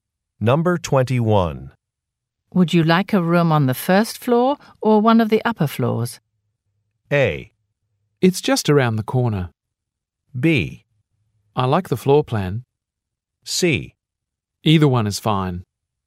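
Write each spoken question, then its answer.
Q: Would you like a room on the first floor or one of the upper floors?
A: C: Either one is fine.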